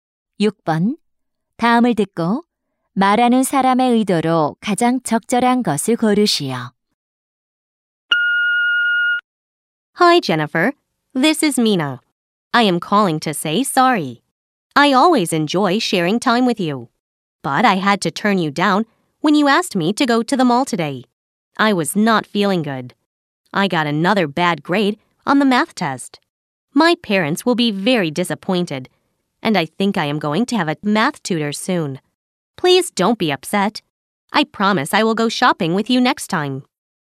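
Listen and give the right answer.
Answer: 사과하기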